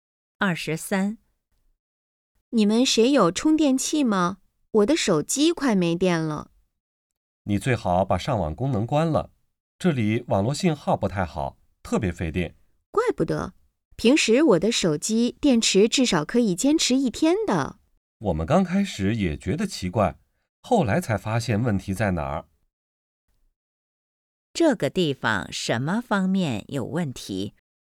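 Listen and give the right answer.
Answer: 网络信号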